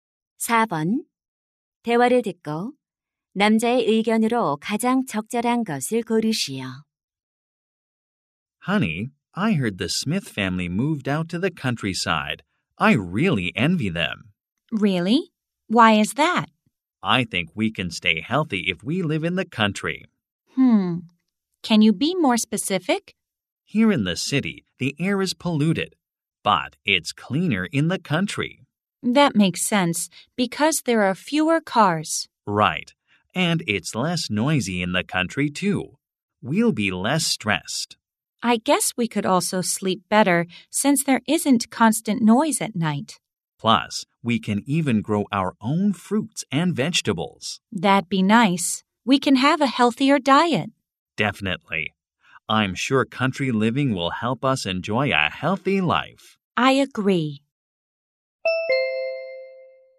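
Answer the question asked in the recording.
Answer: 시골 생활은 건강한 삶에 도움이 된다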